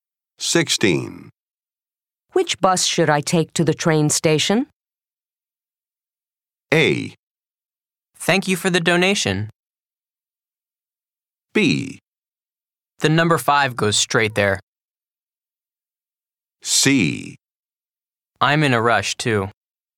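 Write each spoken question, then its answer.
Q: Which bus should I take to the train station?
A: B: The number 5 goes straight there.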